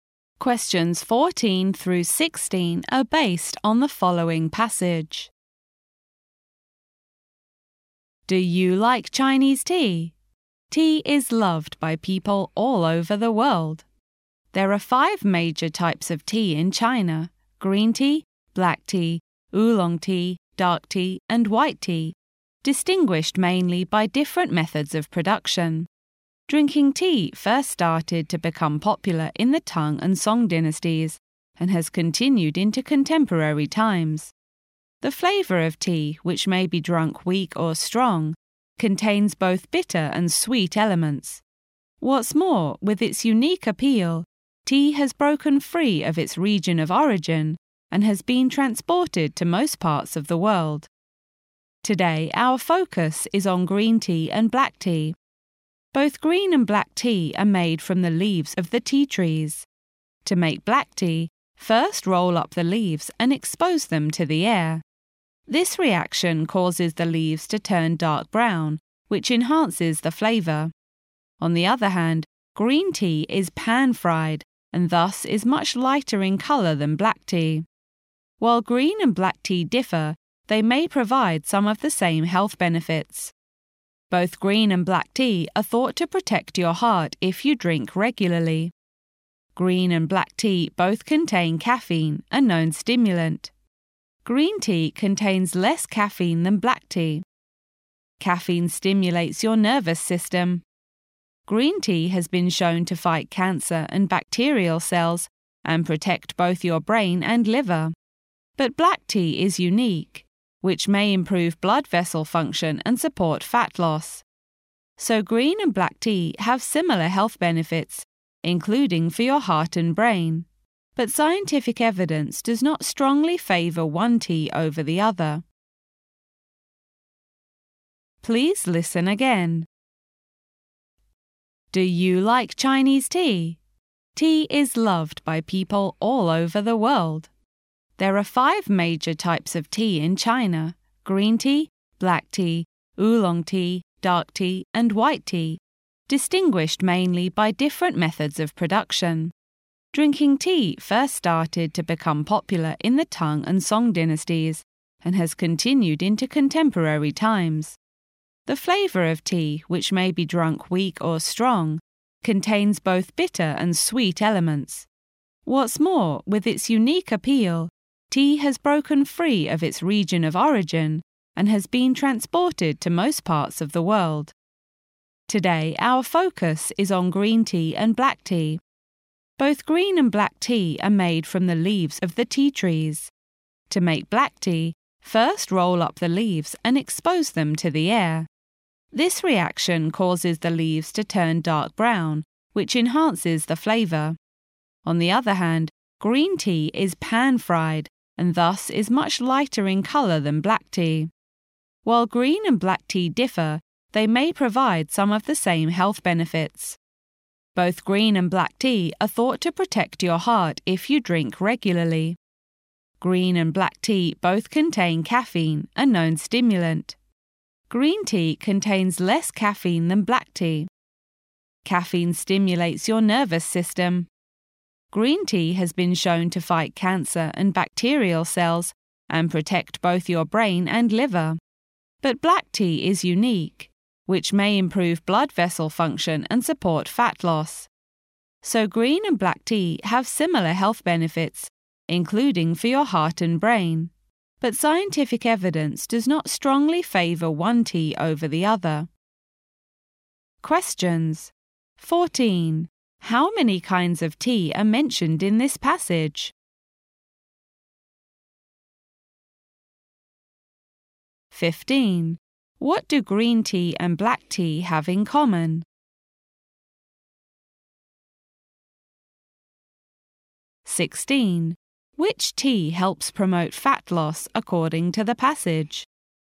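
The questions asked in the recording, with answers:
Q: How many kinds of tea are mentioned in this passage?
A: Five

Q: Which tea helps promote fat loss according to the passage?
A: Black tea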